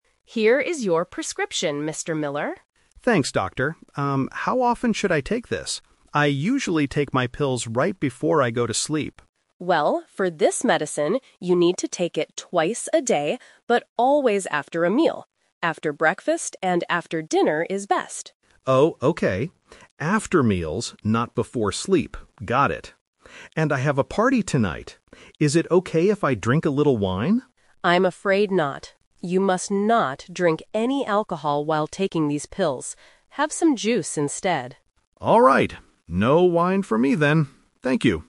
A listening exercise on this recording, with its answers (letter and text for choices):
Listen to the conversation between a doctor and a patient. Choose the correct answer (A, B, or C) for each question.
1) How should the patient take the new medicine?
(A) Right before going to sleep.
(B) Two times a day after meals.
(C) Once a day in the morning.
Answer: (B) Two times a day after meals.

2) Where is Mr. Miller going tonight?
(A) To a pharmacy.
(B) To a restaurant for dinner.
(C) To a party.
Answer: (C) To a party.

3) What is the doctor's strict rule for Mr. Miller?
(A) He must not drink any alcohol.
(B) He should drink wine at the party.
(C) He cannot drink any fruit juice.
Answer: (A) He must not drink any alcohol.

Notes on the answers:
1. The doctor says, "you need to take it twice a day, but always after a meal." ("Twice" means two times). Trap A is wrong (The Twist): Mr. Miller says "I usually take my pills right before I go to sleep." This is his normal habit, but it is NOT the rule for this new medicine. Trap C is wrong: "Breakfast" (morning) is mentioned, but he has to take it after dinner too, so "once a day" is incorrect.
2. Mr. Miller says, "And I have a party tonight." Trap A is wrong: Going to a pharmacy is a logical thing to do with a prescription, but he doesn't mention doing it tonight. Trap B is wrong: Dinner is mentioned when talking about the medicine time, but not as his specific plan for tonight.
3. The doctor clearly warns him, "You must not drink any alcohol while taking these pills." (Wine is a type of alcohol). Trap B is wrong: Mr. Miller asks to drink wine, but the doctor says "I'm afraid not." Trap C is wrong: The doctor actually tells him to "Have some juice instead", so he can drink juice.

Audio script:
Doctor: Here is your prescription, Mr. Miller.
Patient: Thanks, Doctor. Um, how often should I take this? I usually take my pills right before I go to sleep.
Doctor: Well, for this medicine, you need to take it twice a day, but always after a meal. After breakfast and after dinner is best.
Patient: Oh, okay. After meals, not before sleep. Got it. And I have a party tonight. Is it okay if I drink a little wine?
Doctor: I'm afraid not. You must not drink any alcohol while taking these pills.